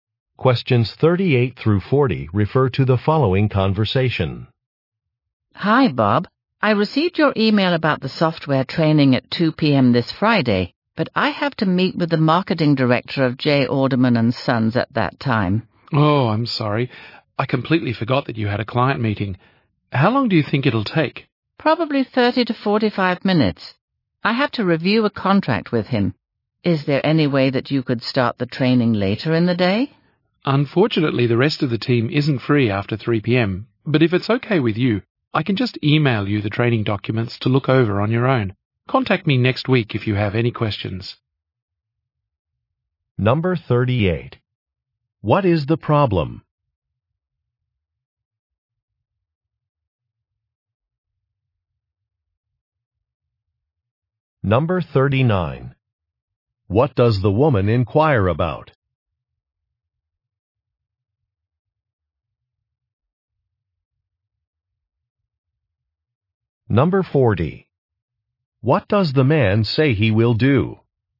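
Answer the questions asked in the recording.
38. The woman has a client meeting at the time of the training
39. Starting the training later in the day
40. Email her the training documents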